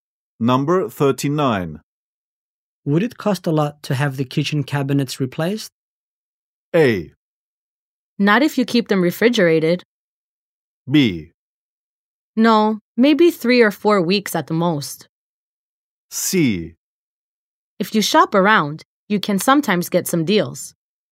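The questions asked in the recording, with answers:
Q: Would it cost a lot to have the kitchen cabinets replaced?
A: C: If you shop around, you can sometimes get some deals.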